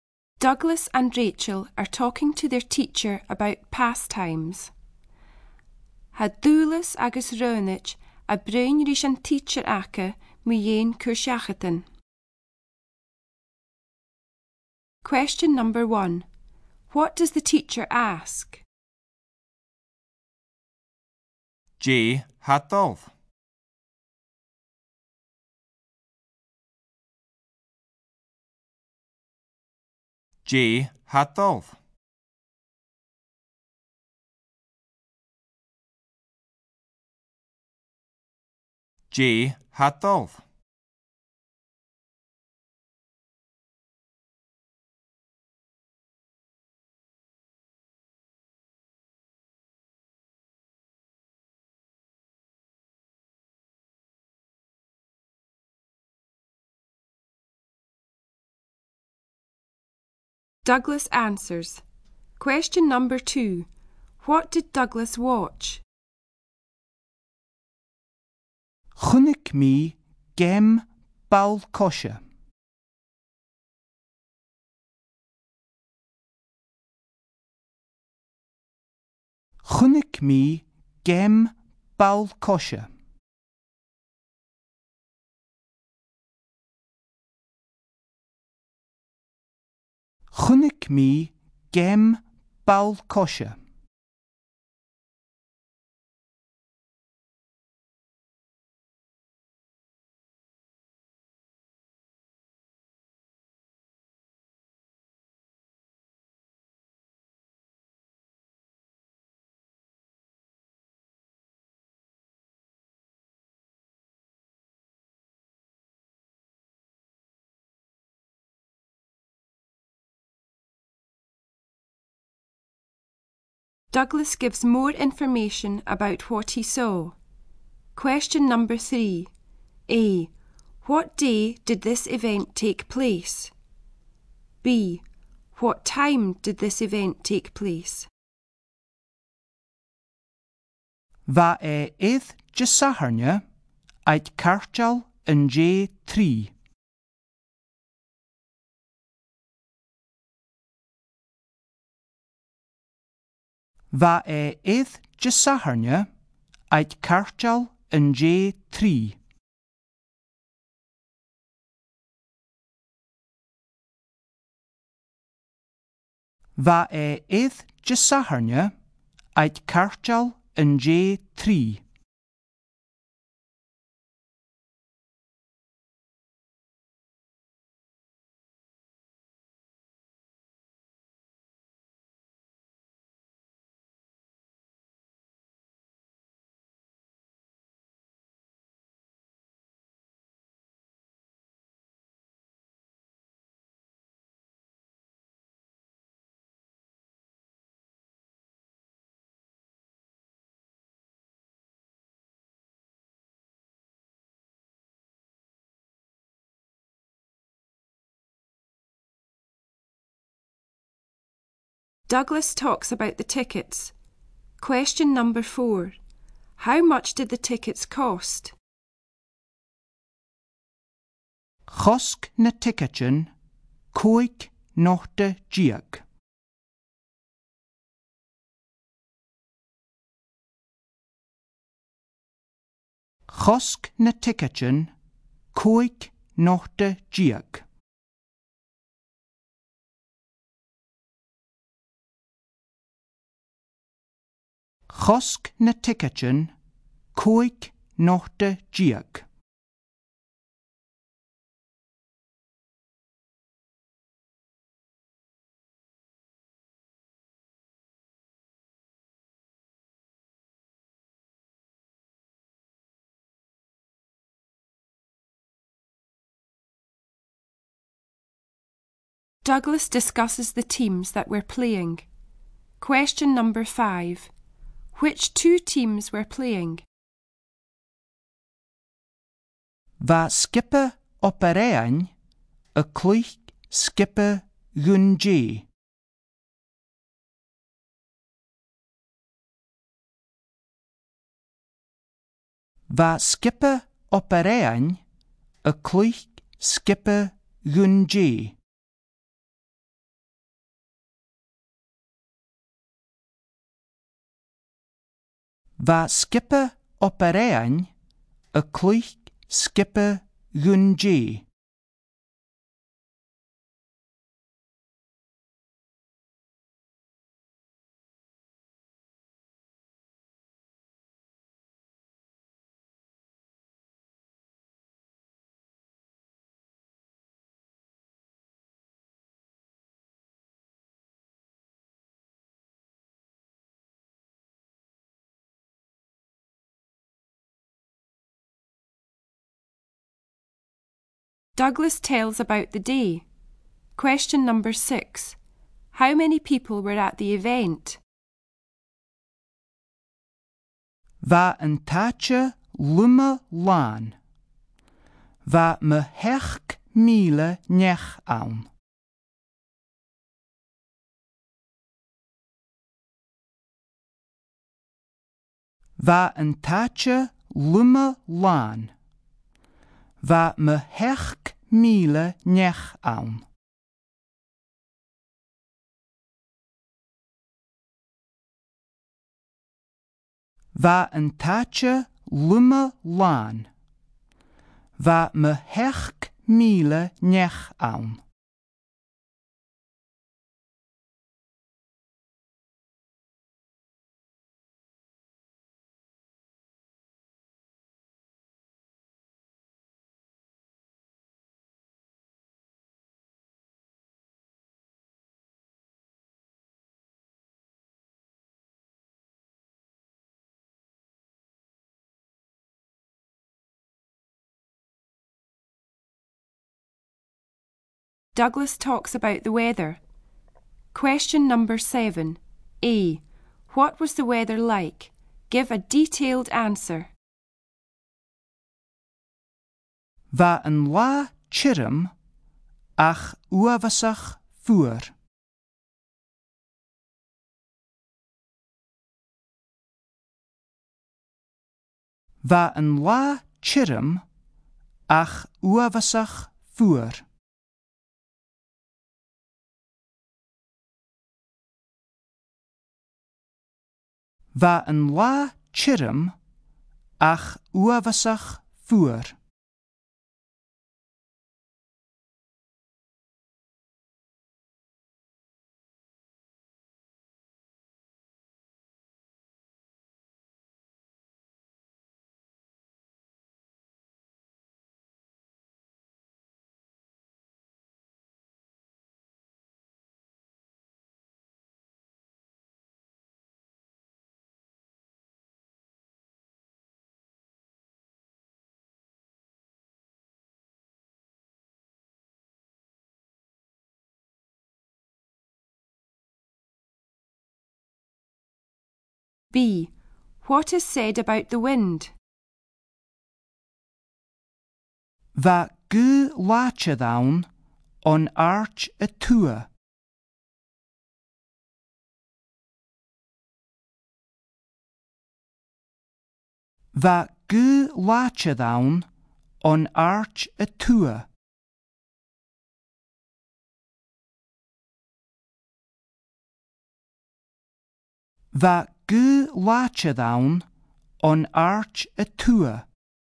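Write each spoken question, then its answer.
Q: What did Douglas watch?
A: A football match

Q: A. What day did this event take place?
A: Saturday

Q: A. What was the weather like?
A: Dry but terribly cold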